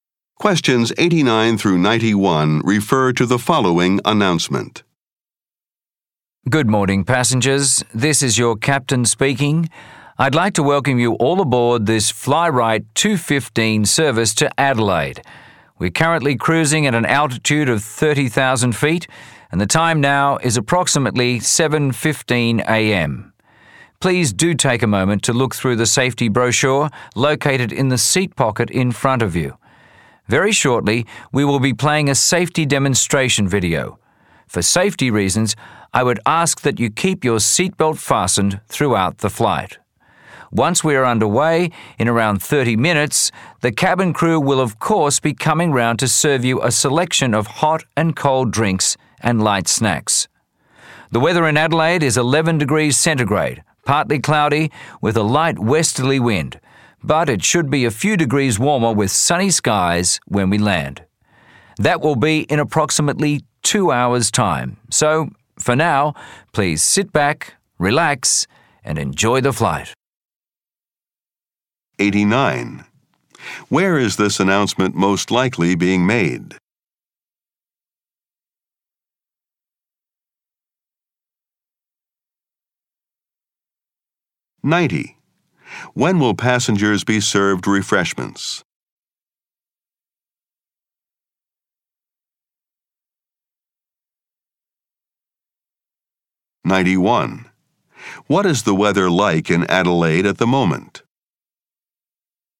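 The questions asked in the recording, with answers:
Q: Where is this announcement most likely being made?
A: On a plane

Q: When will passengers be served refreshments?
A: In about 30 minutes

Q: What is the weather like in Adelaide at the moment?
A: 11 degrees, partly cloudy, with a light westerly wind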